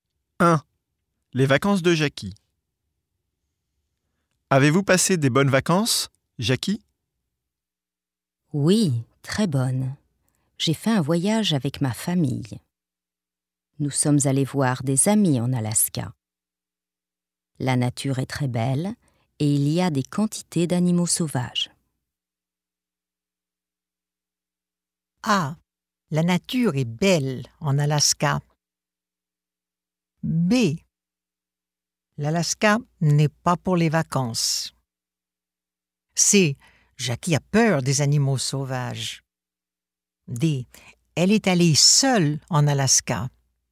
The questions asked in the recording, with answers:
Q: Les vacances de Jackie.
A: A. La nature est belle en Alaska.